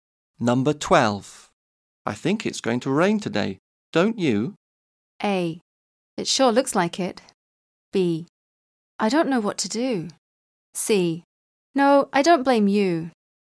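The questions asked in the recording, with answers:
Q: I think it's going to rain today, don't you?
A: A: It sure looks like it.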